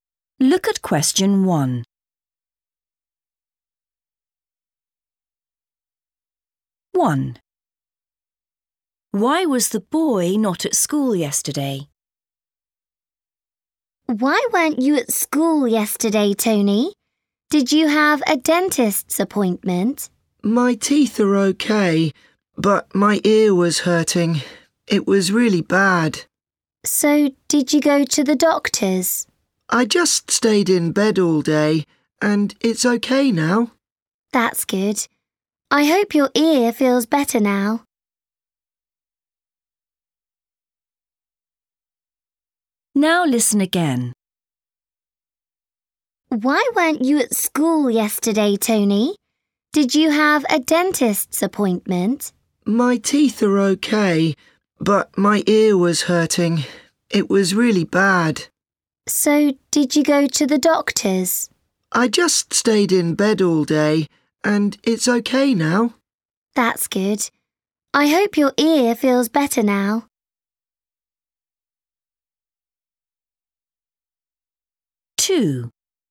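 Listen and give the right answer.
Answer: His ear was hurting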